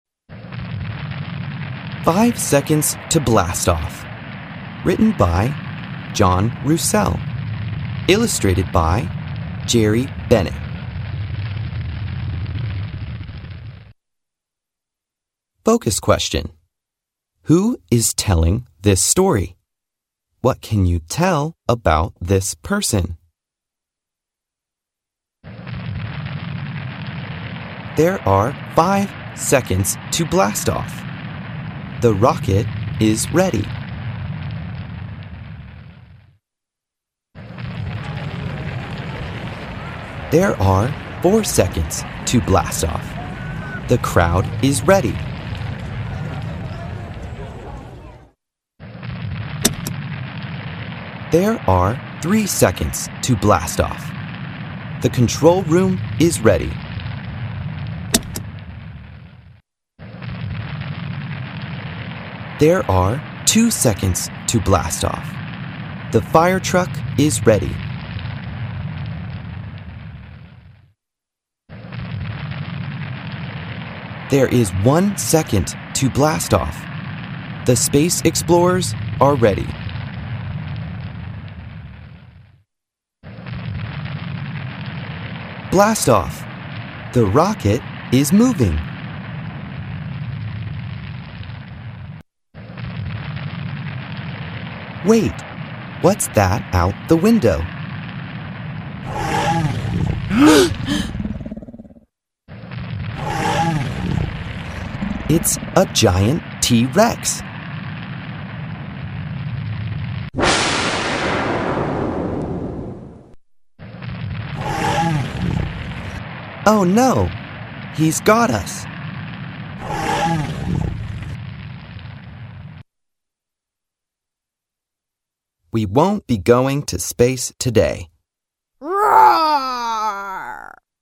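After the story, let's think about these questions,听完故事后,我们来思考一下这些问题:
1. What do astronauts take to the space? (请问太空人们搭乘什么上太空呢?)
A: A rocket

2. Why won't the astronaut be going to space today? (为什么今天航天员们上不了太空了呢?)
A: A giant T-Rex got the rocket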